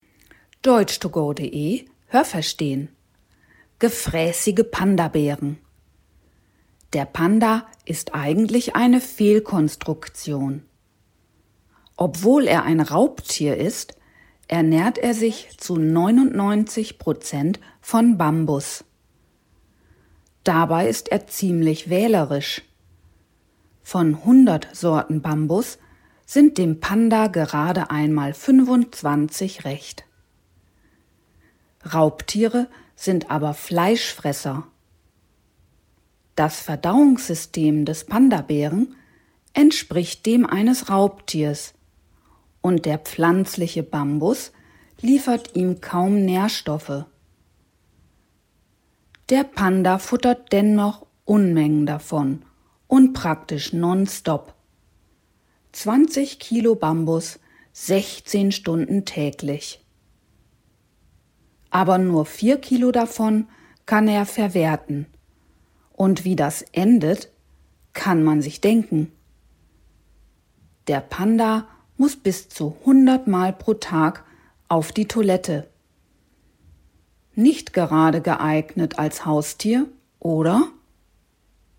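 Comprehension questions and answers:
Welches Adjektiv/Adverb passt?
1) Der Panda ist ziemlich _____ .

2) Es sind ihm gerade einmal 25 Sorten Bambus _____ .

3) Der pflanzliche Bambus liefert ihm _____ Nährstoffe.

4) Der Panda futtert Unmengen Bambus und _____ nonstop.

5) Er ist nicht gerade _____ als Haustier, oder?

Haben Sie das gehört? Stimmt diese Aussage?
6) Ist es richtig, dass der Pandabär kein Raubtier ist?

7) Der Pandabär ernährt sich zu fast 100 % von Bambus.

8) Von 100 Bambussorten schmecken dem Panda gerade mal 35.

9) Das Verdauungssystem des Pandas entspricht dem eines Pflanzenfressers.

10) Bambus liefert dem Pandabären fast keine Nährstoffe.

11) Der Panda frisst 16 Stunden am Tag.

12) Nur 14 Kilo von den 20 Kilo Bambus, die er frisst, kann der Pandabär verwerten.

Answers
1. wählerisch
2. recht
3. kaum
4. praktisch
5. geeignet
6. Falsch
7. Richtig
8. Falsch
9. Falsch
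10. Richtig
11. Richtig
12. Falsch

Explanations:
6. Er ist ein Raubtier.
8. Ihm schmecken sogar nur 25.
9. Es entspricht dem eines Raubtiers.

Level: A (einfach)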